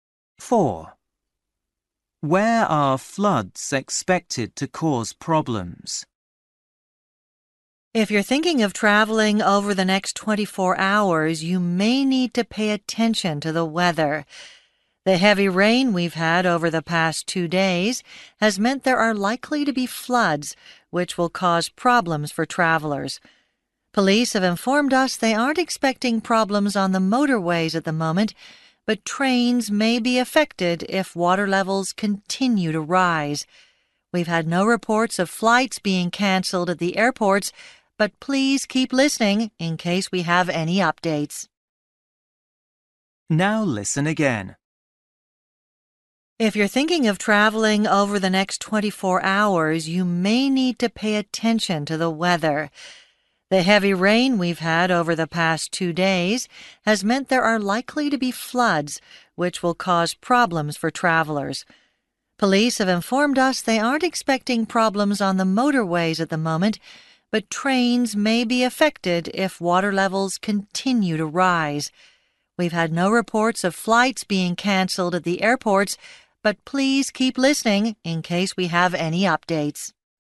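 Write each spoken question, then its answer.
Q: Where are floods expected to cause problems?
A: On the trains (railways)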